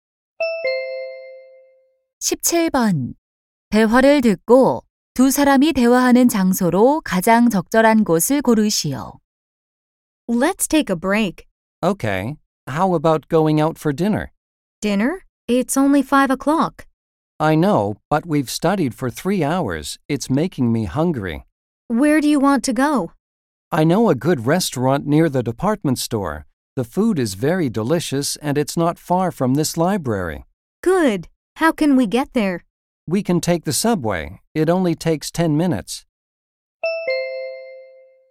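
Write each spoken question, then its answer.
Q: 대화를 듣고 두 사람이 대화하는 장소로 가장 적절한 곳을 고르시오.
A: 도서관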